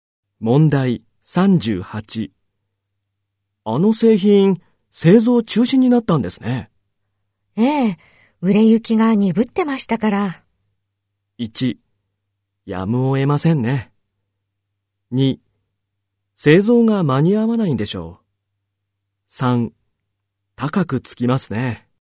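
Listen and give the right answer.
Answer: 1: やむを得ませんね。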